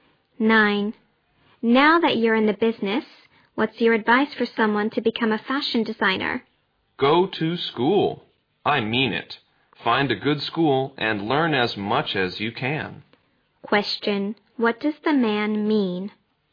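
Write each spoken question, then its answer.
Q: Question. What does the man mean?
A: Go to a good school and learn as much as possible.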